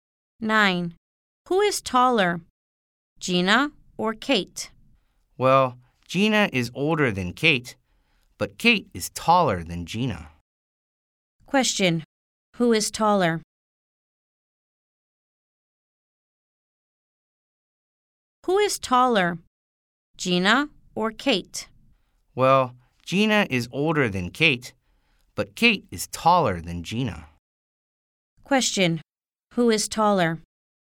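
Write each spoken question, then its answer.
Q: Who is taller?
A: Kate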